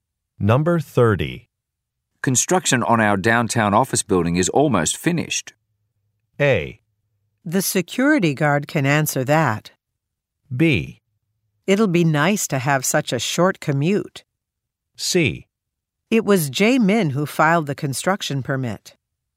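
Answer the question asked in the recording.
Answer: B: It'll be nice to have such a short commute.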